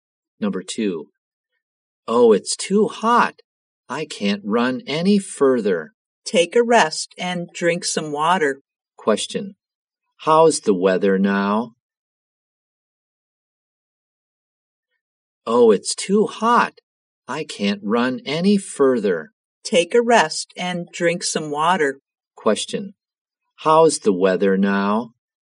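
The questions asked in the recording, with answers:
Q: How's the weather now?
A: Hot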